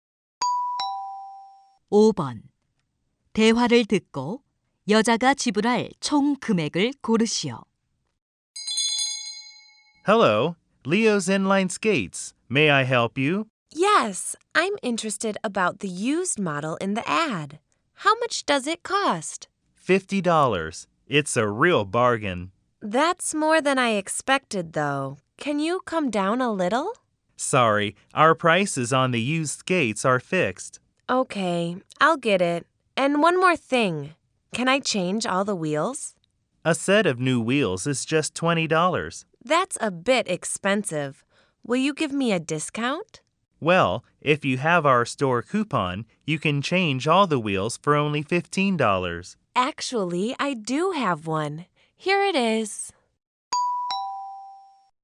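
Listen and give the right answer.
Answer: $65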